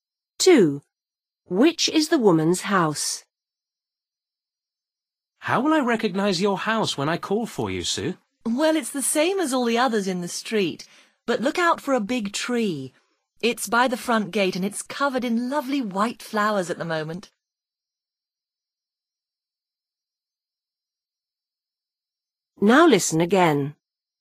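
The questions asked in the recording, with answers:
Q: Which is the woman's house?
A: the house with a big tree with white flowers by the front gate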